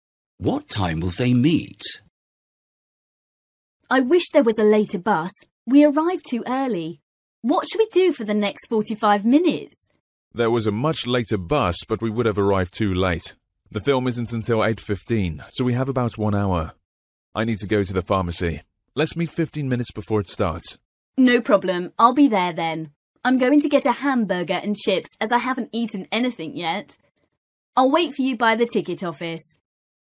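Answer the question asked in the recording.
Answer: 8:00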